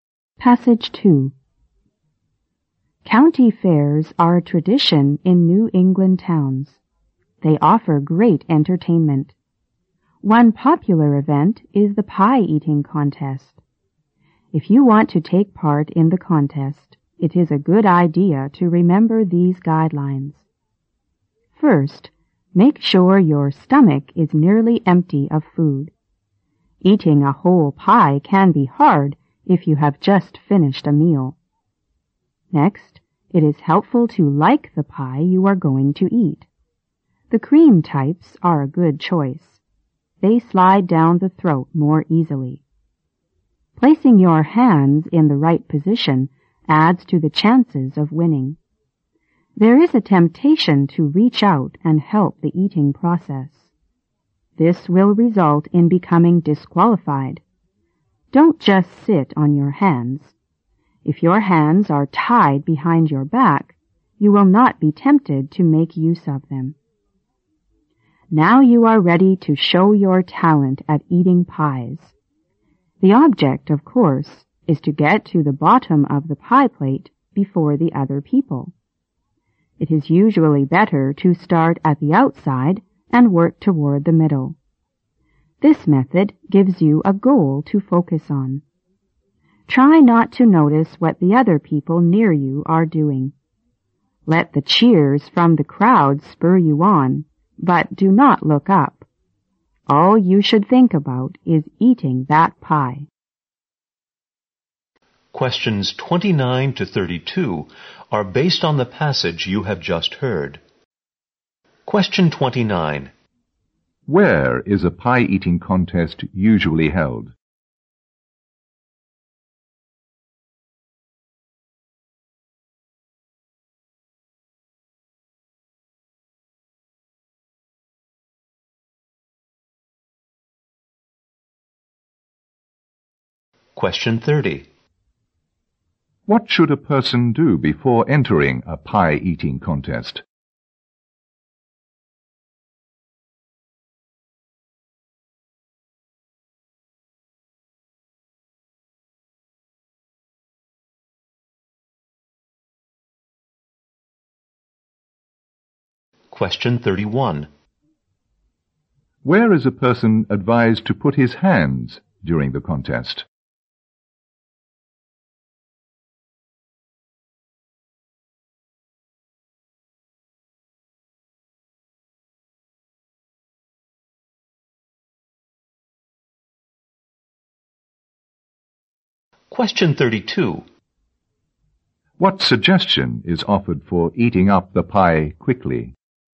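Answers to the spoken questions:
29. At county fairs in New England towns
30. Make sure their stomach is nearly empty
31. Tied behind his back
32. Start at the outside and work toward the middle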